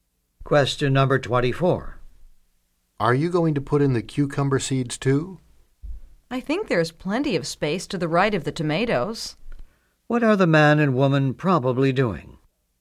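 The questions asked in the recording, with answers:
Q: What are the man and woman probably doing?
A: Planting a vegetable garden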